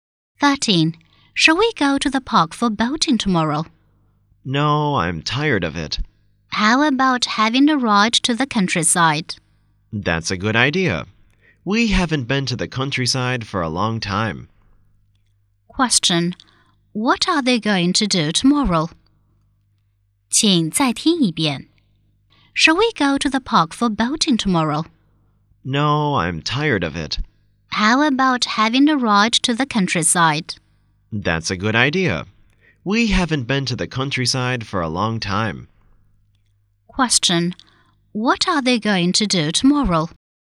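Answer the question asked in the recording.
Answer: Have a ride to the countryside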